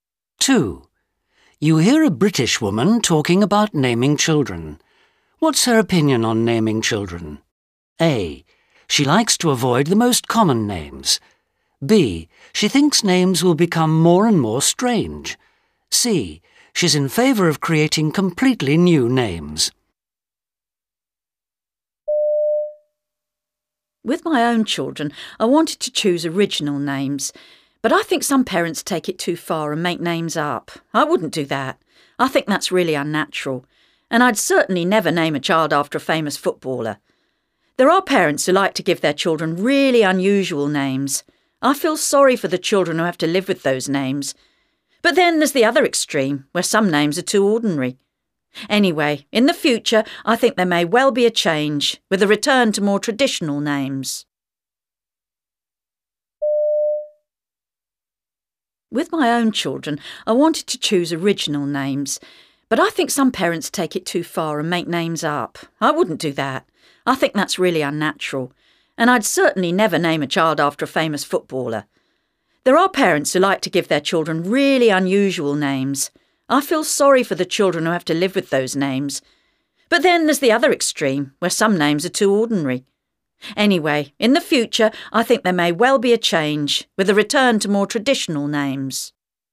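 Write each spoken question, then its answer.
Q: What's her opinion on naming children?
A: A: She likes to avoid the most common names.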